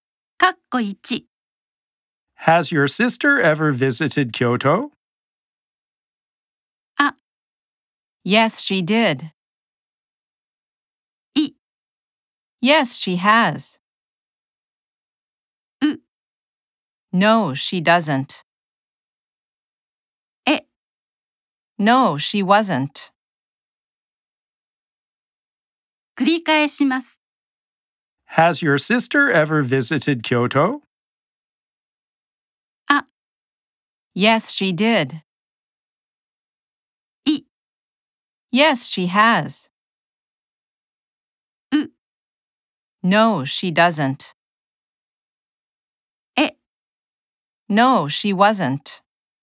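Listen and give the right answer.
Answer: I: Yes, she has.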